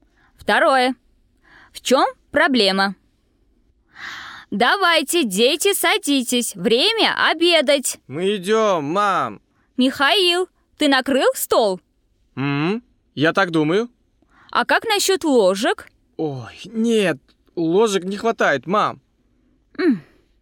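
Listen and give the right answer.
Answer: Не хватает ложек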